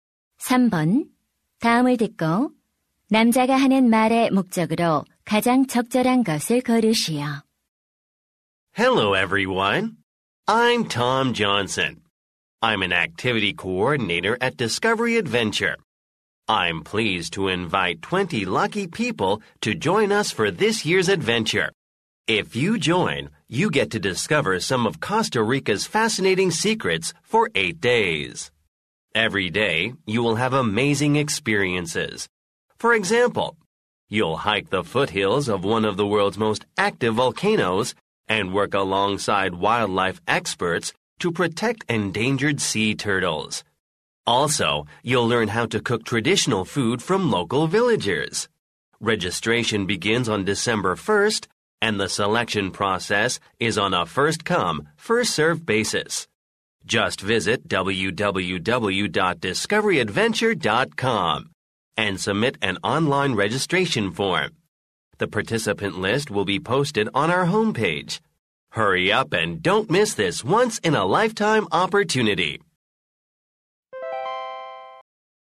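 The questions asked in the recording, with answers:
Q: 다음을 듣고 남자가 하는 말의 목적으로 가장 적절한 것을 고르시오.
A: 코스타리카 모험 프로그램 참가자를 모집하려고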